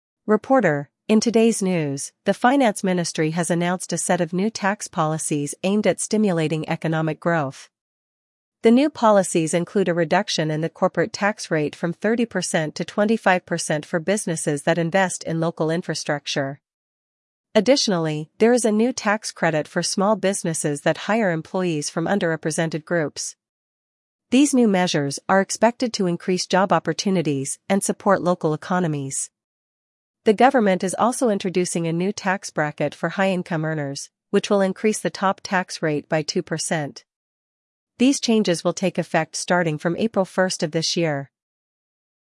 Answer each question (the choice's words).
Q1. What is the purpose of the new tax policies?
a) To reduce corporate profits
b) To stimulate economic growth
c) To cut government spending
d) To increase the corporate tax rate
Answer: To stimulate economic growth

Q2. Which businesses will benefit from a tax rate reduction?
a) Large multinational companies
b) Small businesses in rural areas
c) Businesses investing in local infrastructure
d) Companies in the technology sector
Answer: Businesses investing in local infrastructure

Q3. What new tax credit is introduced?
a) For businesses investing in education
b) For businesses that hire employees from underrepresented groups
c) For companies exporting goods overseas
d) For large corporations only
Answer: For businesses that hire employees from underrepresented groups

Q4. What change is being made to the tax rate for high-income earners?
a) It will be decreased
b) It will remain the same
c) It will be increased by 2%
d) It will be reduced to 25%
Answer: It will be increased by 2%

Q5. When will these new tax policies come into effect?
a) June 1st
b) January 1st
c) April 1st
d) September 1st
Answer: April 1st

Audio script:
Reporter: "In today's news, the Finance Ministry has announced a set of new tax policies aimed at stimulating economic growth. The new policies include a reduction in the corporate tax rate from 30% to 25% for businesses that invest in local infrastructure. Additionally, there is a new tax credit for small businesses that hire employees from underrepresented groups. These new measures are expected to increase job opportunities and support local economies. The government is also introducing a new tax bracket for high-income earners, which will increase the top tax rate by 2%. These changes will take effect starting from April 1st of this year."